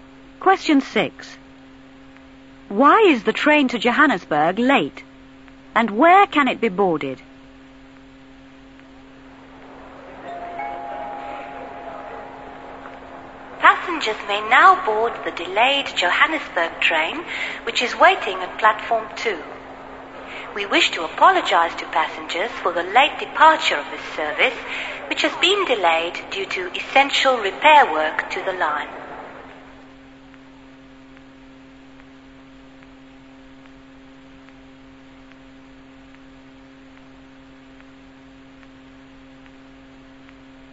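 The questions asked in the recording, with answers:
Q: Why is the train to Johannesburg late?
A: Because of essential repair work to the line

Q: And where can it be boarded?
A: At Platform 2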